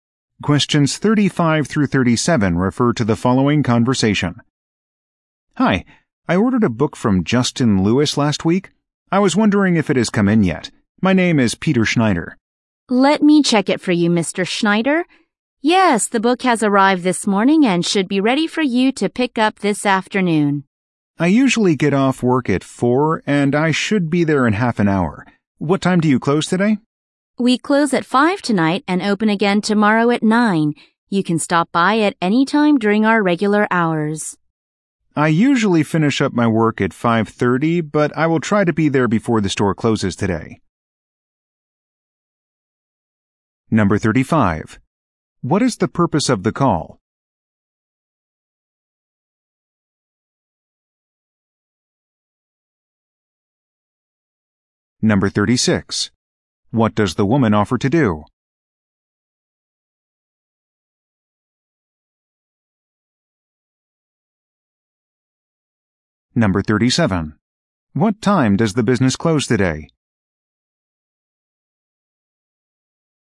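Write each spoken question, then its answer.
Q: What is the purpose of the call?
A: To check if an ordered book has arrived

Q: What time does the business close today?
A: At 5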